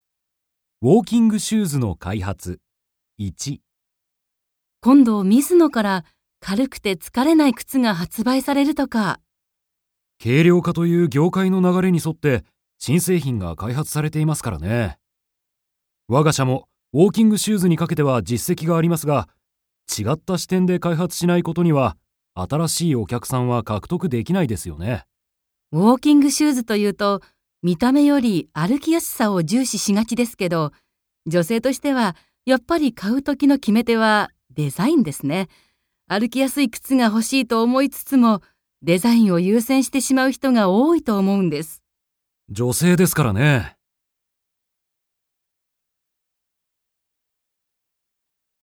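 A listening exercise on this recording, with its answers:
Listen and answer the question.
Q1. 女性が買うときの決め手はな何ですか。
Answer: デザイン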